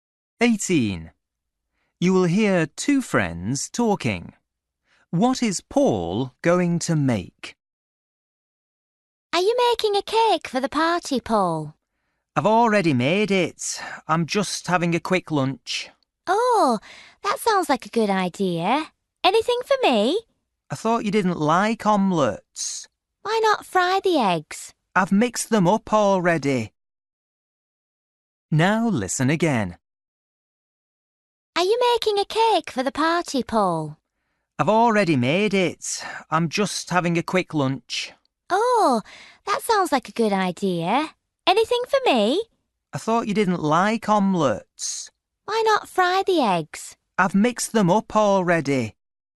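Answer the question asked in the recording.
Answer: an omelette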